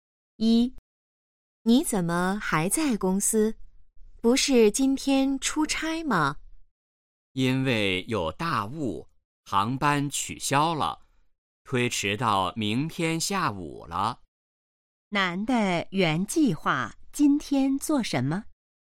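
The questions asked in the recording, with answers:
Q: 男的原计划今天做什么?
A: 出差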